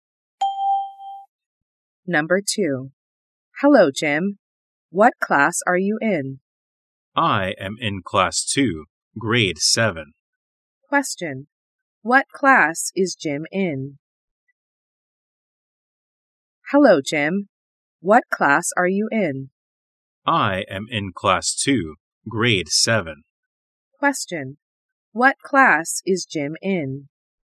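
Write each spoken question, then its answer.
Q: What class is Jim in?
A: Class 2, Grade 7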